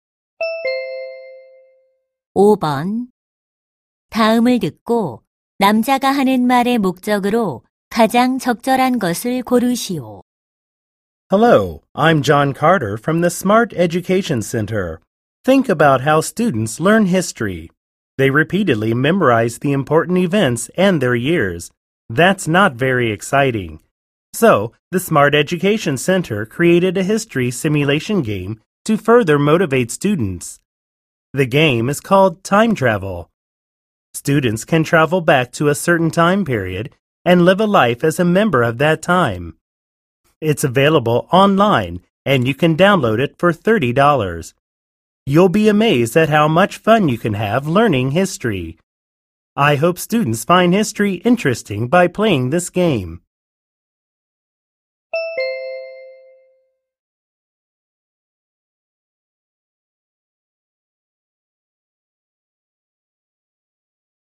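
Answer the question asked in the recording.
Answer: 역사 시뮬레이션 게임을 홍보하려고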